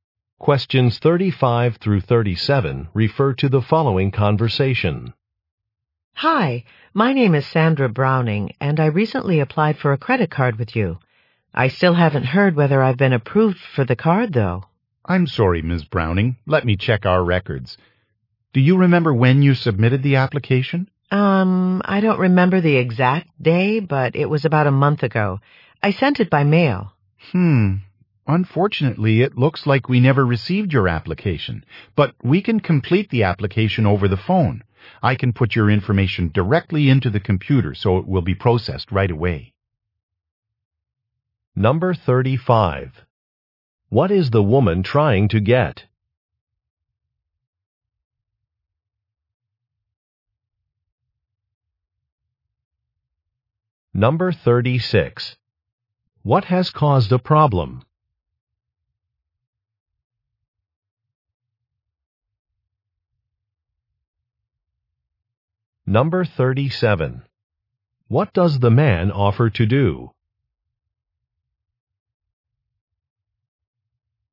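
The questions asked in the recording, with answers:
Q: What is the woman trying to get?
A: A credit card

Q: What has caused a problem?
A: Her mailed application was never received

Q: What does the man offer to do?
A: Complete the application over the phone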